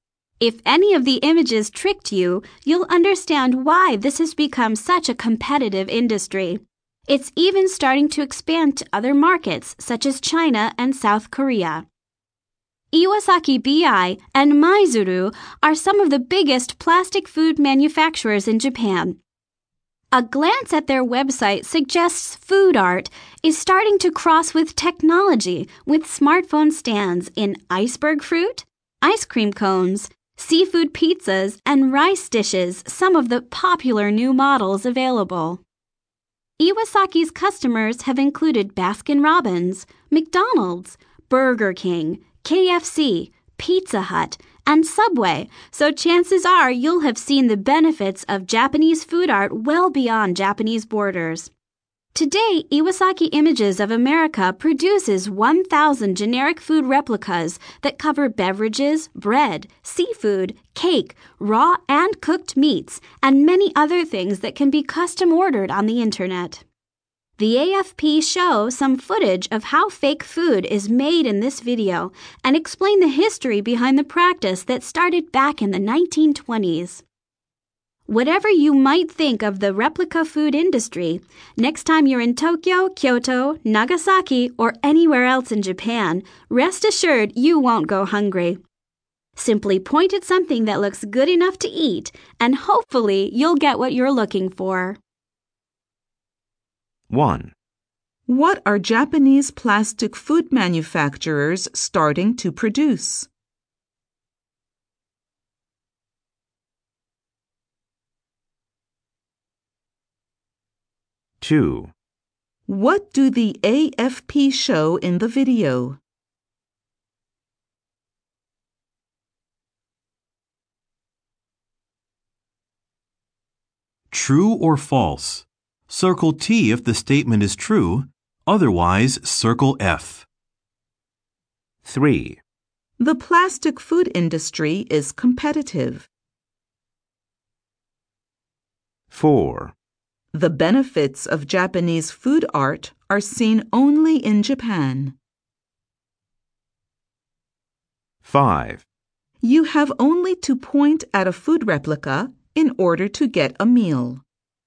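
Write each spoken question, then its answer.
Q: What are Japanese plastic food manufacturers starting to produce?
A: Smartphone stands shaped like food

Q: What do the AFP show in the video?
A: How fake food is made and the history behind it

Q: The plastic food industry is competitive.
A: True

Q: The benefits of Japanese food art are seen only in Japan.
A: False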